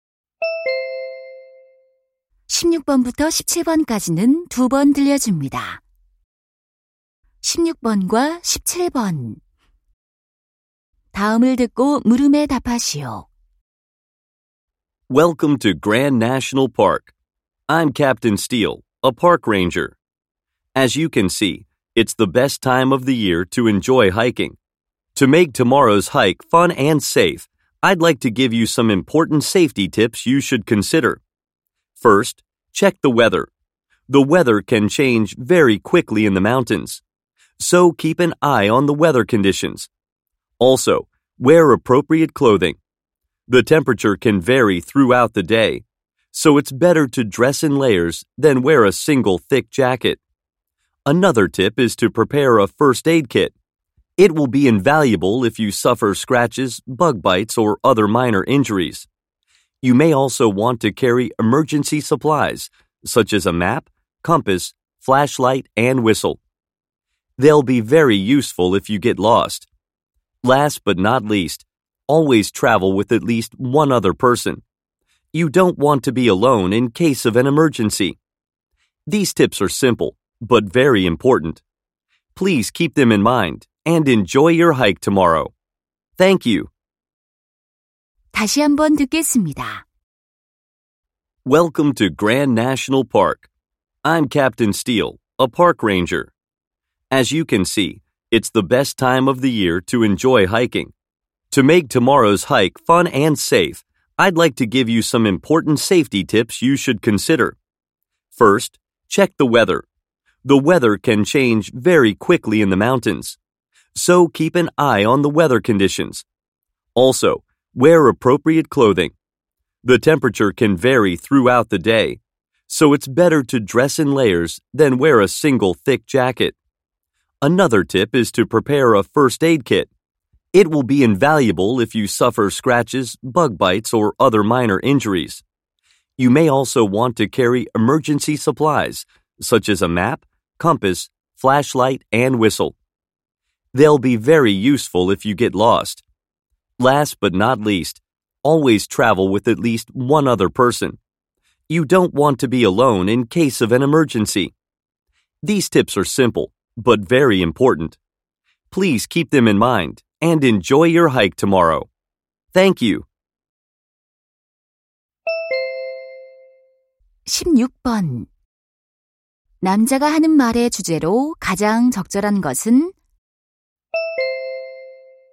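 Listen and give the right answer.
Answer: 안전한 하이킹을 위한 주의사항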